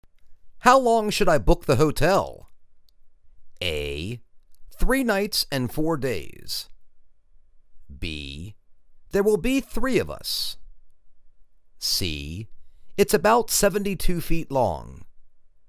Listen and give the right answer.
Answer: Three nights and four days.